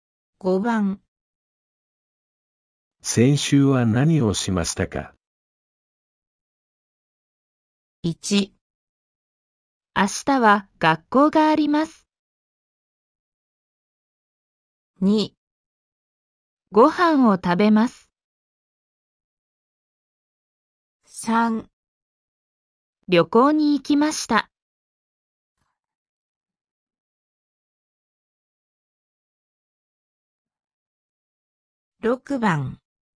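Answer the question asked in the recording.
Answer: 3

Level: N5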